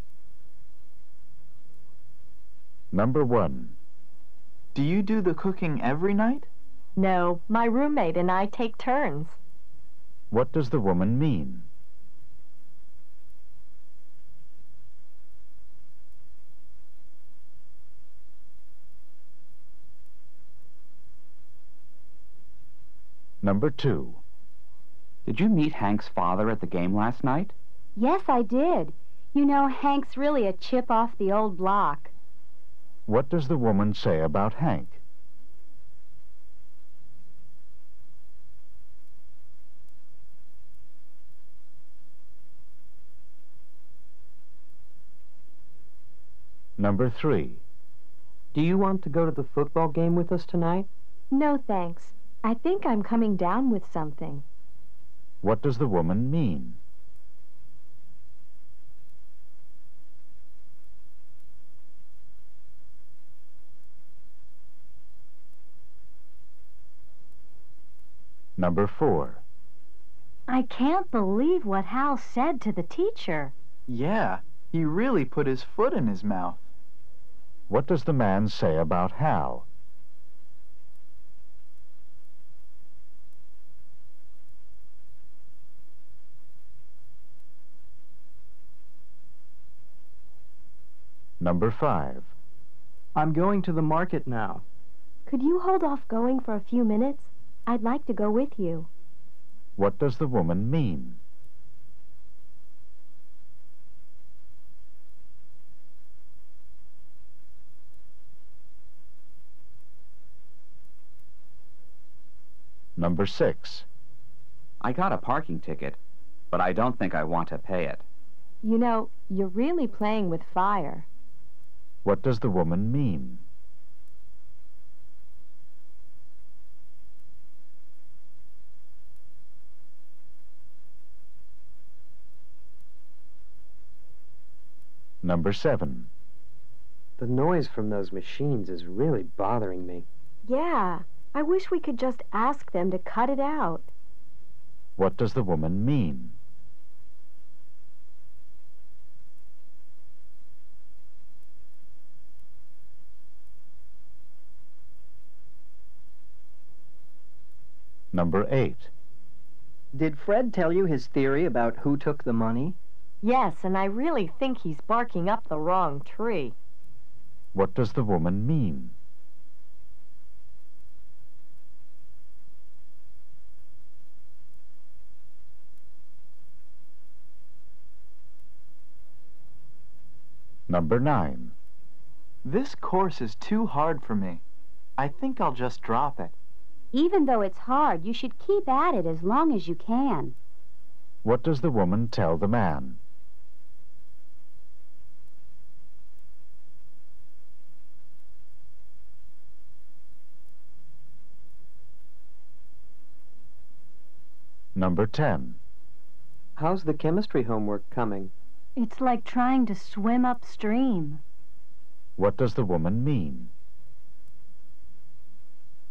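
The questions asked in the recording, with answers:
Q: What does the woman mean?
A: She and her roommate take turns cooking.

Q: What does the woman say about Hank?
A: He is very much like his father.

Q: What does the woman mean?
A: She thinks she is getting sick.

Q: What does the man say about Hal?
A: Hal said something embarrassing or inappropriate.

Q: What does the woman mean?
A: She wants the man to wait so she can go with him.

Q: What does the woman mean?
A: Not paying the ticket is dangerous.

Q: What does the woman mean?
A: She wishes they could ask them to stop the noise.

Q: What does the woman mean?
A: Fred's theory is wrong.

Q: What does the woman tell the man?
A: He should not give up the course.

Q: What does the woman mean?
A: The homework is very difficult.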